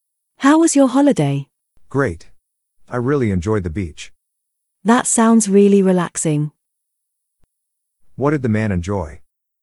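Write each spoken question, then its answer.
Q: What did the man enjoy?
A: The beach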